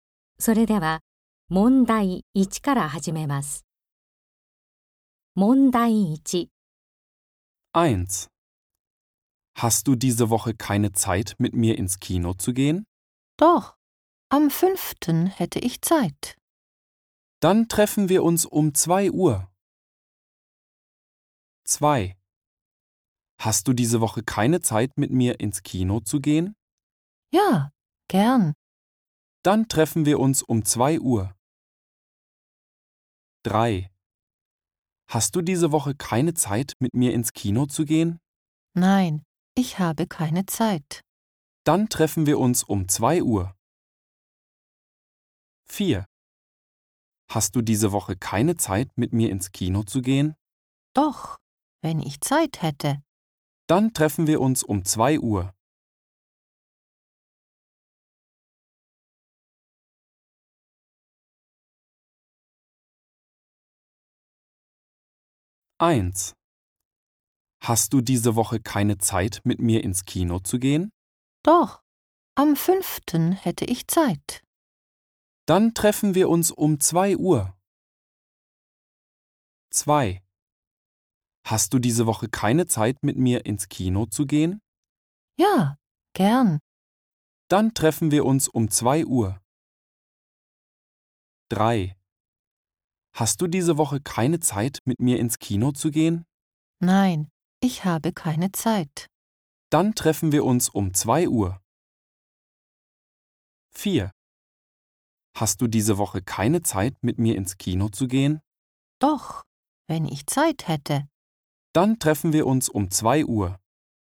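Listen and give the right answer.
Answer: 1: Doch, am 5. hätte ich Zeit.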